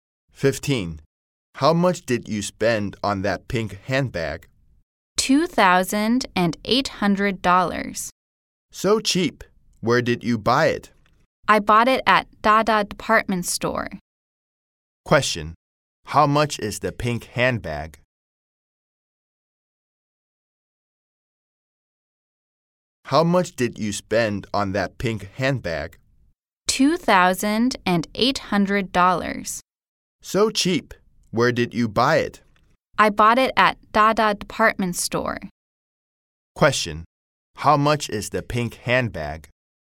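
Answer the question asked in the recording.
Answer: $2,800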